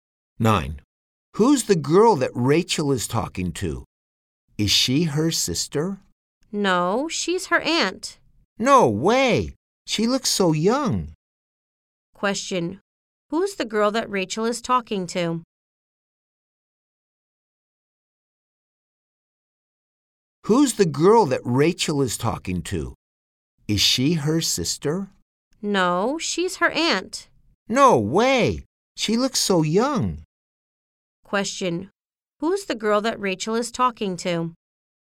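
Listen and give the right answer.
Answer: Her aunt.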